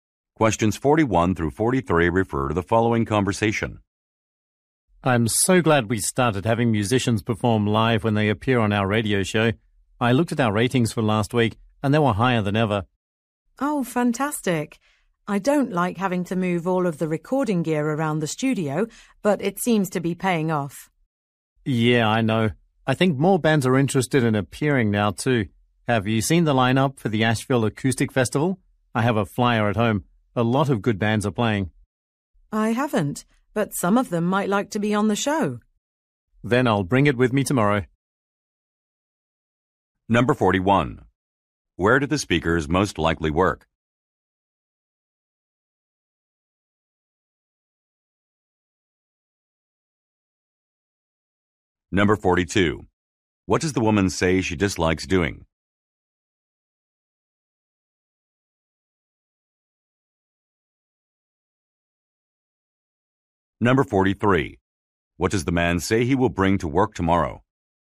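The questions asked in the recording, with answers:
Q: Where do the speakers most likely work?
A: At a radio station

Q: What does the woman say she dislikes doing?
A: Moving the recording gear around the studio

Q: What does the man say he will bring to work tomorrow?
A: A festival flyer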